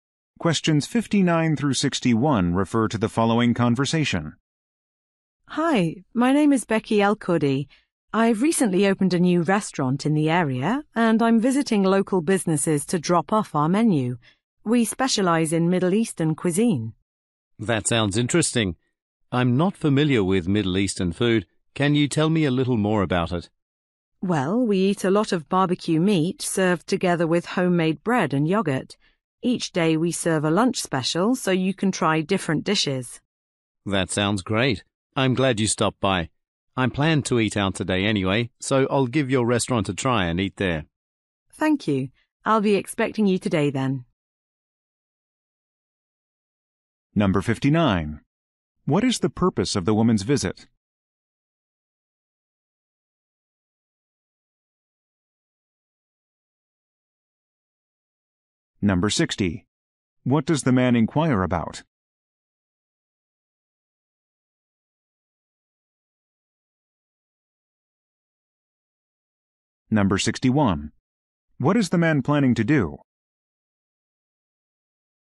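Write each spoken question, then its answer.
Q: What is the purpose of the woman's visit?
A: To promote her new restaurant by dropping off menus

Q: What does the man inquire about?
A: Middle Eastern food

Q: What is the man planning to do?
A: Eat at the woman's restaurant today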